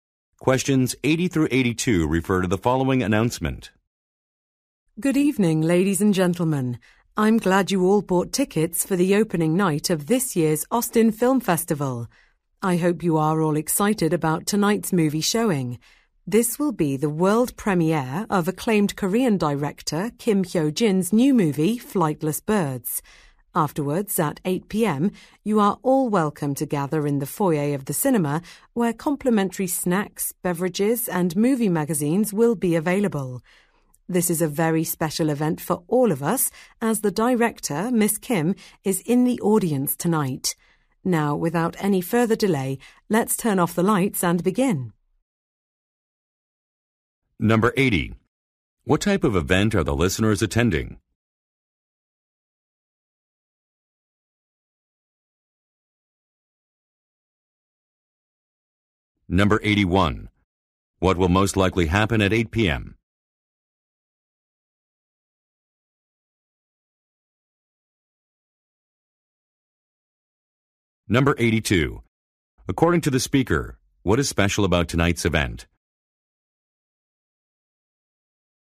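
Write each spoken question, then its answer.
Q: What type of event are the listeners attending?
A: A film festival (movie premiere)

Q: What will most likely happen at 8 p.m.?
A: Free snacks and drinks will be served in the foyer

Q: According to the speaker, what is special about tonight's event?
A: The director is in the audience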